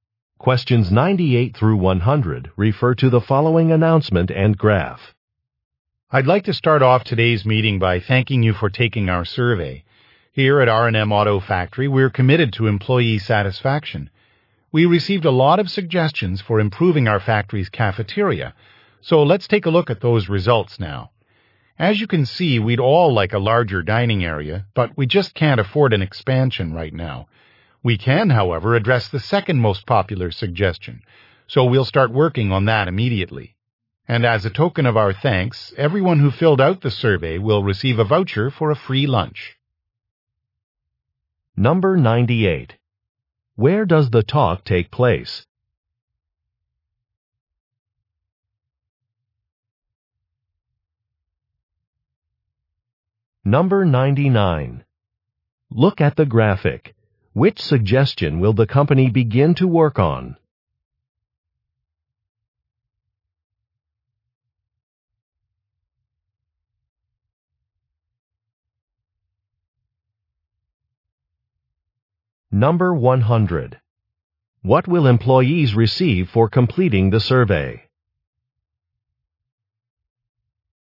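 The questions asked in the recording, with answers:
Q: Where does the talk take place?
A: At a car factory

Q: What will employees receive for completing the survey?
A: A voucher for a free lunch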